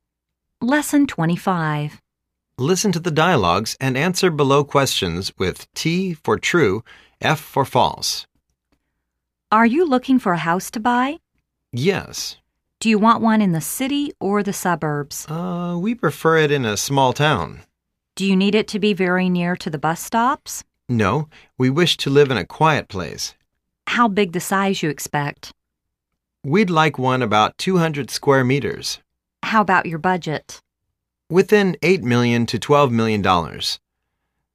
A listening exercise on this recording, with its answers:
Listen to the dialogues and answer below questions with T for "Truth" , F for "False".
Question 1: They want to rent a house.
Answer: F

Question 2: They'd like to live in the suburbs.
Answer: F

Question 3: They wish they can find a 200 square meters house.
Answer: T

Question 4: They want the house to be very near to the bus station.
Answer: F

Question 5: A house of $10000000 is over their budget.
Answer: F